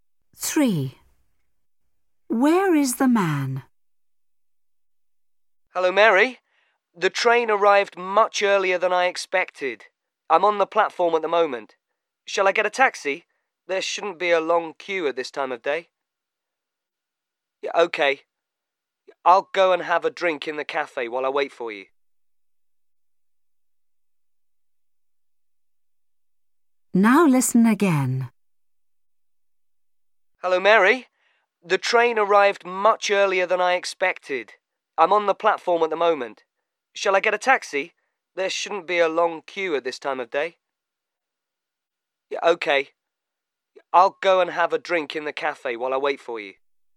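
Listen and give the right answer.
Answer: on the platform at the train station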